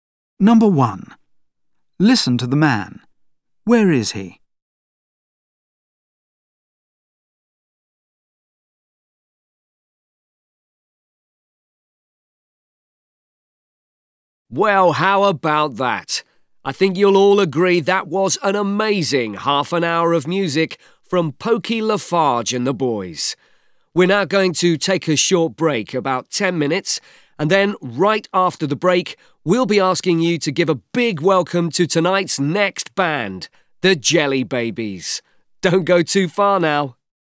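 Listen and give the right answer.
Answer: At a concert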